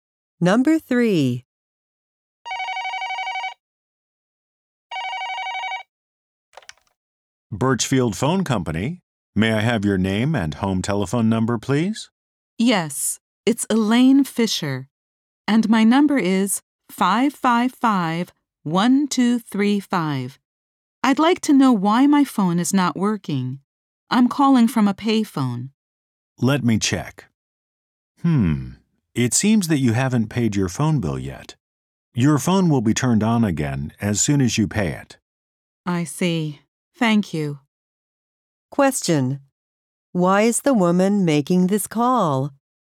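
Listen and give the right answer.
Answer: Her home phone is not working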